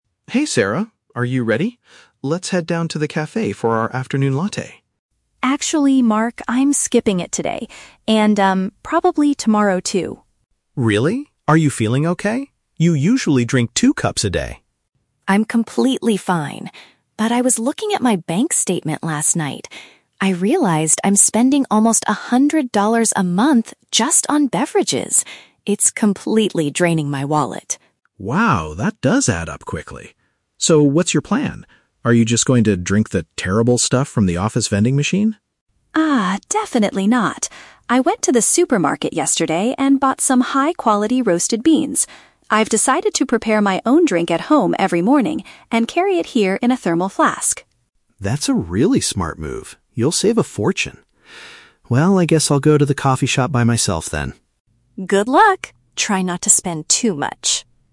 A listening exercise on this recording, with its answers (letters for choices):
Listen to a conversation between two colleagues and choose the correct answer (A, B, or C) for each question.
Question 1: Why does Sarah decide to skip the café visit?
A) She wants to decrease her personal financial spending.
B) She is currently experiencing some health issues.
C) She is too busy with a difficult project at work.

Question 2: What is Sarah's alternative plan for getting her daily coffee?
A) She will consume the drinks provided in the workplace.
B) She will make it at her house and transport it to work.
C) She will completely stop drinking caffeinated beverages.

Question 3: What will Mark do immediately after their conversation?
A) He will visit the grocery store to purchase coffee beans.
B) He will head to the café without his coworker.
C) He will borrow Sarah's thermal flask for his drink.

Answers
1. A
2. B
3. B

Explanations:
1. Sarah says that spending a hundred dollars a month is "draining my wallet" and she wants to stop. "Decrease personal financial spending" is a paraphrase of saving money. Why the trap is wrong: Option (B) is the trap. Mark asks, "Are you feeling okay?" because he thinks she might be sick, but Sarah explicitly rejects this by saying, "I'm completely fine!" Option (C) is a plausible office situation, but it is not mentioned.
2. Sarah explains that she will "prepare my own drink at home every morning and carry it here." This directly matches making it at her house and transporting it. Why the trap is wrong: Option (A) is the trap. Mark asks if she will drink from the "office vending machine" (drinks provided in the workplace), but Sarah quickly rejects this, saying, "Ah, definitely not." Option (C) is a plausible health choice, but she is still drinking coffee, just making it herself.

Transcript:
Mark: Hey Sarah, are you ready? Let's head down to the café for our afternoon latte.
Sarah: Actually, Mark, I'm skipping it today. And, um, probably tomorrow too.
Mark: Really? Are you feeling okay? You usually drink two cups a day.
Sarah: I'm completely fine! But I was looking at my bank statement last night. I realized I'm spending almost a hundred dollars a month just on beverages. It's completely draining my wallet.
Mark: Wow, that does add up quickly. So, what's your plan? Are you just going to drink the terrible stuff from the office vending machine?
Sarah: Ah, definitely not. I went to the supermarket yesterday and bought some high-quality roasted beans. I've decided to prepare my own drink at home every morning and carry it here in a thermal flask.
Mark: That's a really smart move. You'll save a fortune. Well, I guess I'll go to the coffee shop by myself then.